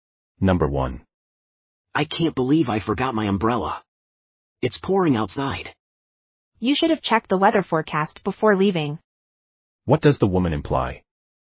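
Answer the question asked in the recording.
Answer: The man should have checked the weather forecast before leaving.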